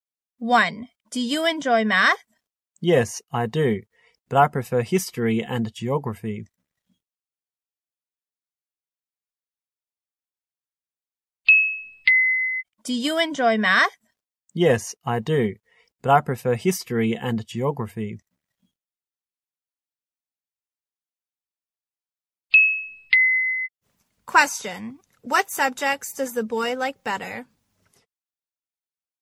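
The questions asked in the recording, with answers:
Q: What subjects does the boy like better?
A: History and geography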